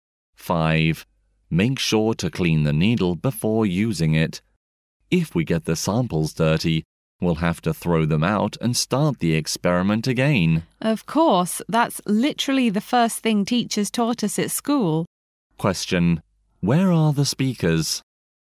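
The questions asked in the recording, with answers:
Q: Where are the speakers?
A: In a laboratory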